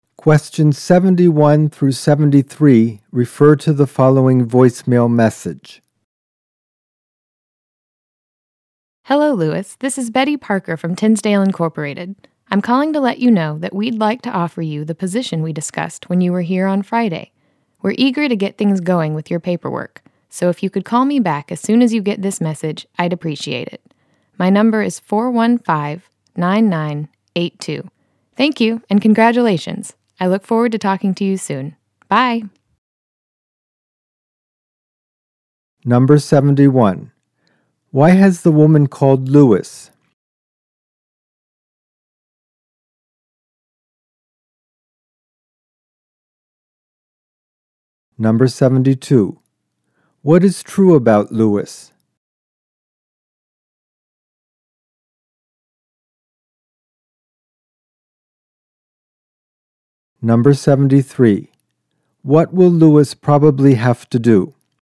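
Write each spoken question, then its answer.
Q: Why has the woman called Lewis?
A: To offer him a job position

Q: What will Lewis probably have to do?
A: Call Betty back and complete paperwork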